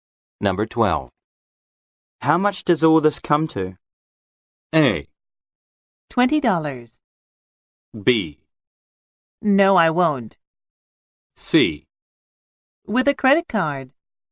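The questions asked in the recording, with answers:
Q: How much does all this come to?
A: A: $20.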